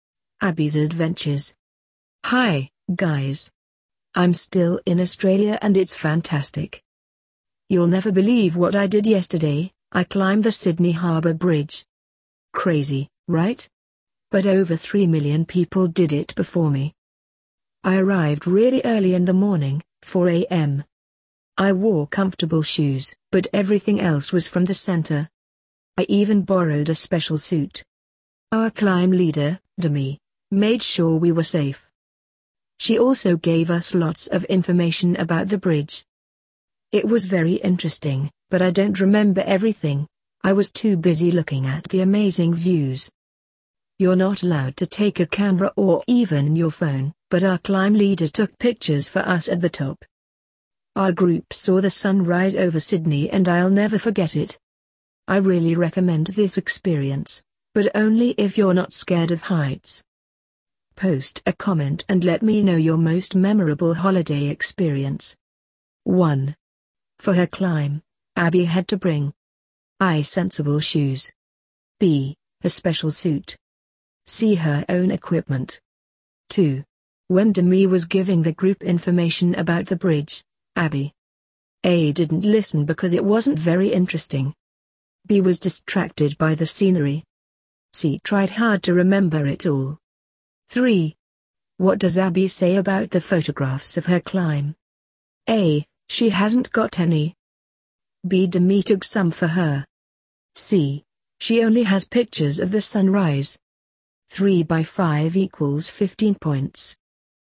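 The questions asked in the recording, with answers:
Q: For her climb, Abby had to bring A.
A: A: Sensible shoes

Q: When Demi was giving the group information about the bridge, Abby A.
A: B: was distracted by the scenery

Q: What does Abby say about the photographs of her climb?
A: B: Demi took some for her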